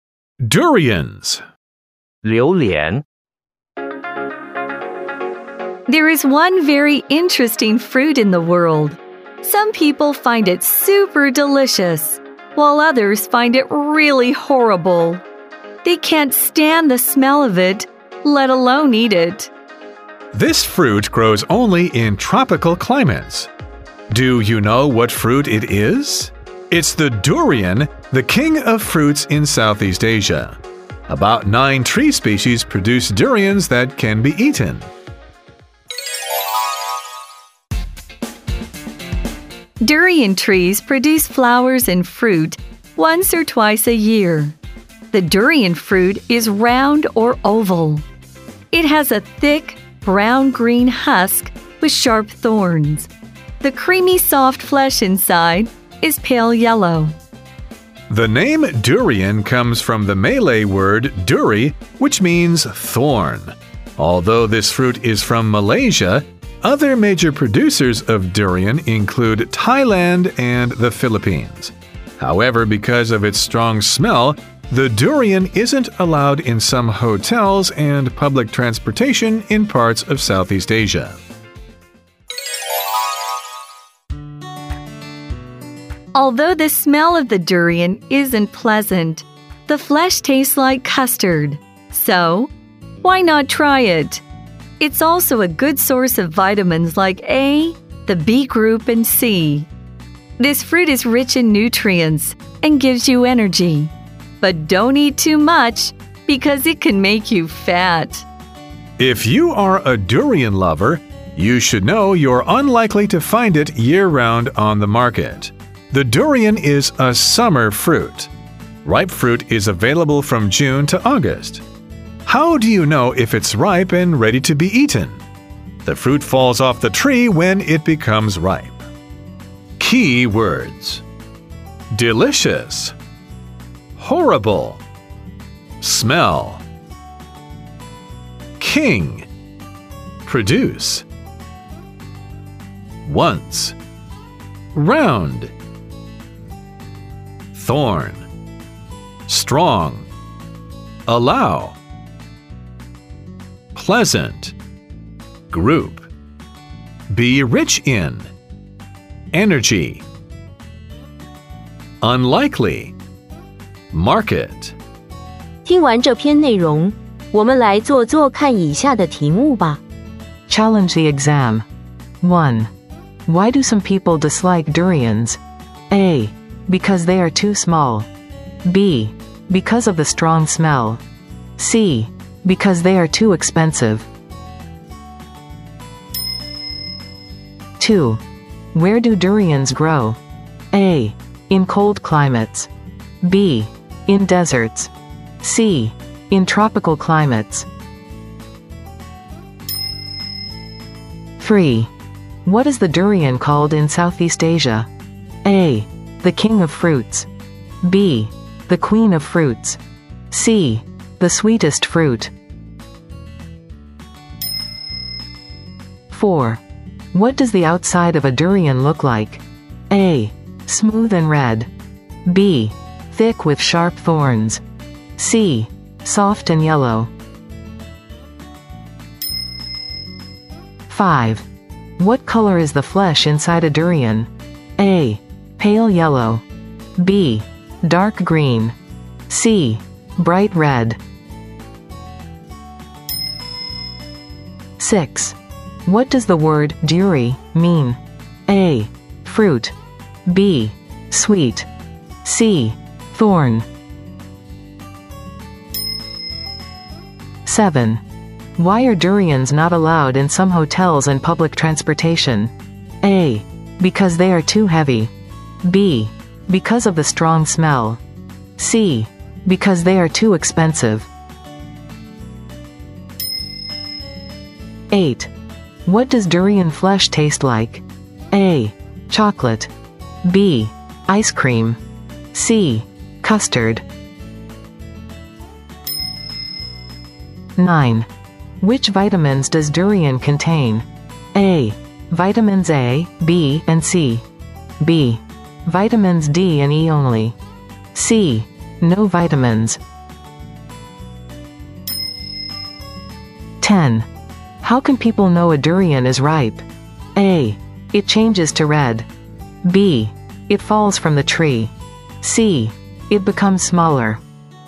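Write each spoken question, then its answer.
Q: Why do some people dislike durians?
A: B: Because of the strong smell.

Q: Where do durians grow?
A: C: In tropical climates.

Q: What is the durian called in Southeast Asia?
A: A: The king of fruits.

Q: What does the outside of a durian look like?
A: B: Thick with sharp thorns.

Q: What color is the flesh inside a durian?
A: A: Pale yellow.

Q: What does the word duri mean?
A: C: Thorn.

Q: Why are durians not allowed in some hotels and public transportation?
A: B: Because of the strong smell.

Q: What does durian flesh taste like?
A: C: Custard.

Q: Which vitamins does durian contain?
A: A: Vitamins A, B, and C.

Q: How can people know a durian is ripe?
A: B: It falls from the tree.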